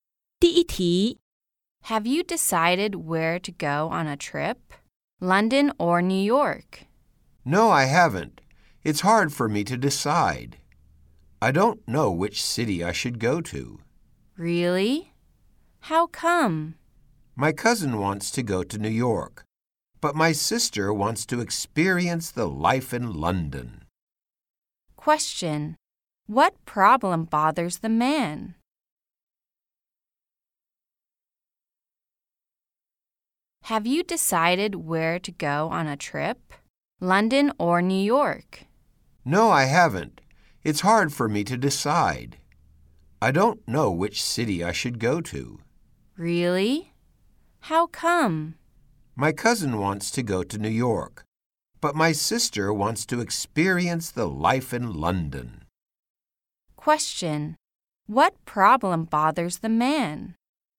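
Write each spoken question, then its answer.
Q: What problem bothers the man?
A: He can't decide whether to go to London or New York.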